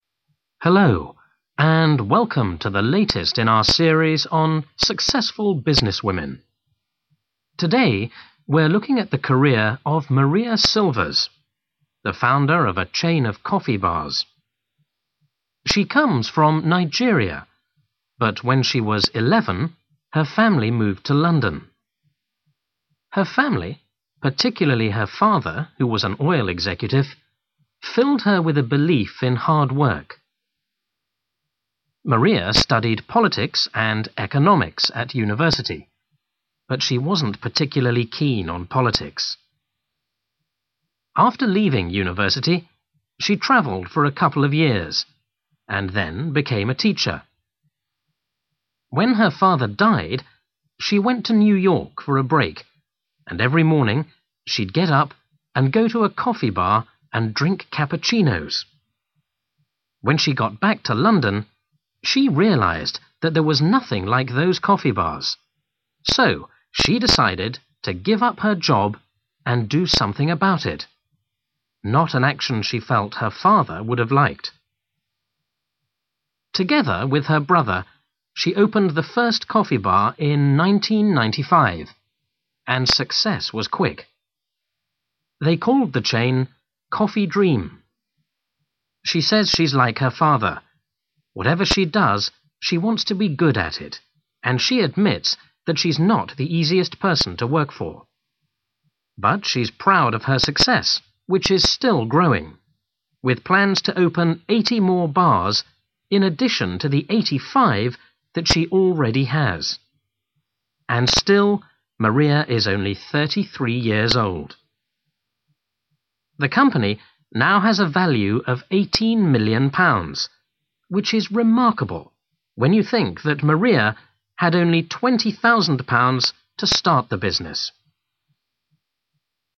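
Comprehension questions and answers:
For each question, fill in the missing information in the numbered space.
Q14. Maria was born in (14) but left when she was 11 years old.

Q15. The subject she preferred at university was (15).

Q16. Her first job was as a (16).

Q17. In 1995, Maria and her (17) opened their first coffee bar.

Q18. The number of coffee bars that she has opened so far is (18).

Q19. Her business is now worth £ (19).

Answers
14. Nigeria
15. economics
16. teacher
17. brother
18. 85
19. 18 million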